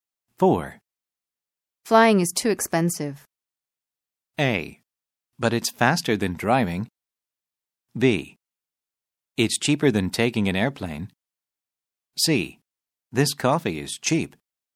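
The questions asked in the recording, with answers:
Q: Flying is too expensive.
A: A: But it's faster than driving.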